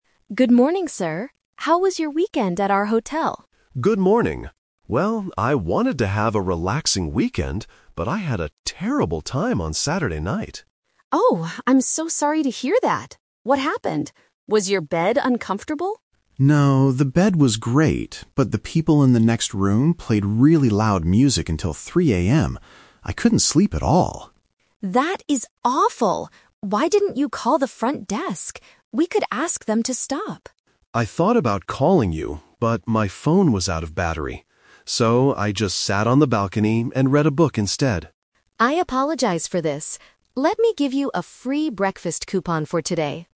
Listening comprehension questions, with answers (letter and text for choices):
Listen to the conversation between a hotel guest and a receptionist. Then, circle the correct answer for each question.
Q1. What was the guest's problem on Saturday night?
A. His bed was uncomfortable.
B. The people next door were very noisy.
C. His room was too cold.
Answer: B. The people next door were very noisy.

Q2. Why didn't the guest call the receptionist?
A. Because his phone had no power.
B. Because he didn't know the phone number.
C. Because the front desk was closed.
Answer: A. Because his phone had no power.

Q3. What did the guest actually do during the night?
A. He listened to music.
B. He went to sleep at 3 AM.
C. He read a book outside.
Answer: C. He read a book outside.

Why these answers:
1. The guest complains, "But the people in the next room played really loud music until 3 AM." Option (A) is a trap; the receptionist asks if the bed was uncomfortable, but the guest says, "No, the bed was great." Option (C) is never mentioned.
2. The guest explains, "I thought about calling you, but my phone was out of battery." "Out of battery" means it had no power. Options (B) and (C) are plausible reasons in real life, but they are not in the audio.
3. The guest says, "So, I just sat on the balcony and read a book instead." Option (A) is a trap; the neighbors listened to music, not him. Option (B) is also a trap; the music played until 3 AM, but he explicitly states, "I couldn't sleep at all!"

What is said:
Receptionist: Good morning, sir. How was your weekend at our hotel?
Guest: Good morning. Well, I wanted to have a relaxing weekend, but I had a terrible time on Saturday night.
Receptionist: Oh, I'm so sorry to hear that. What happened? Was your bed uncomfortable?
Guest: No, the bed was great. But the people in the next room played really loud music until 3 AM. I couldn't sleep at all!
Receptionist: That is awful. Why didn't you call the front desk? We could ask them to stop.
Guest: I thought about calling you, but my phone was out of battery. So, I just sat on the balcony and read a book instead.